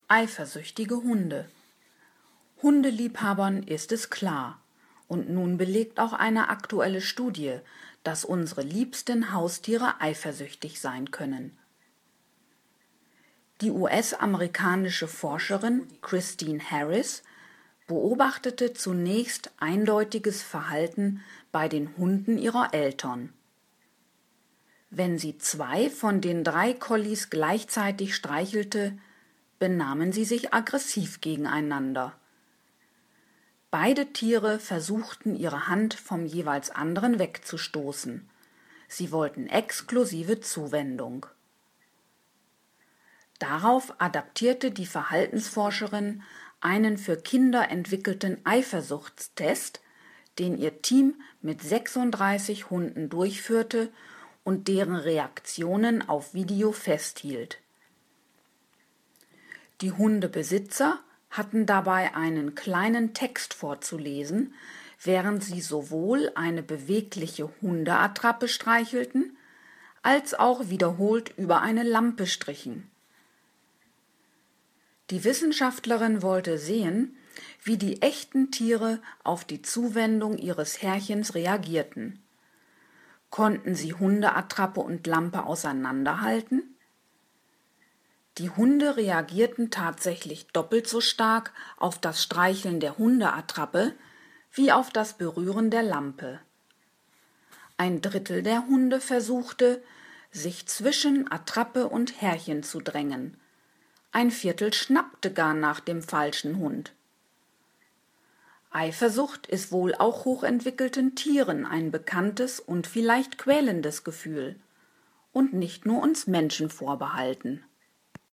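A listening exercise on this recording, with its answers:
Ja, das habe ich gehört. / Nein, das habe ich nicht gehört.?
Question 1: Die Forscherin Christine Harris beobachtete zunächst eifersüchtiges Verhalten bei Hunden von Freunden.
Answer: Nein, das habe ich nicht gehört.

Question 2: Die Hunde stießen die streichelnde Hand der Forscherin vom jeweils anderen weg.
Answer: Ja, das habe ich gehört.

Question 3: Harris übernahm für ihre Studie an Hunden einen Test, der ursprünglich für Kinder entwickelt worden war.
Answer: Ja, das habe ich gehört.

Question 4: In dem Versuch las die Forscherin einen Text vor und streichelte eine Hundeattrappe sowie eine Lampe.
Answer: Nein, das habe ich nicht gehört.

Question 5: Die Hunde konnten einen Unterschied zwischen Hundeattrappe und Lampe erkennen.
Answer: Ja, das habe ich gehört.

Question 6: Die Hunde reagierten bei den Berührungen ihrer Besitzer von Hundeattrappe und Lampe dreimal so stark, wenn ihre Herrchen die Hundeattrappe streichelten.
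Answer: Nein, das habe ich nicht gehört.

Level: C1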